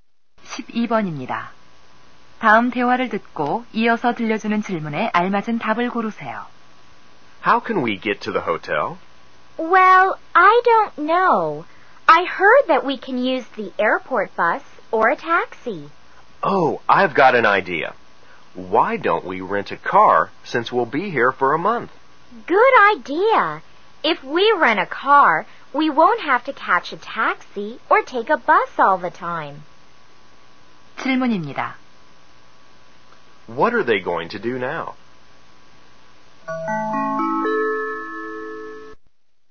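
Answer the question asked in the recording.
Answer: 렌터카를 빌린다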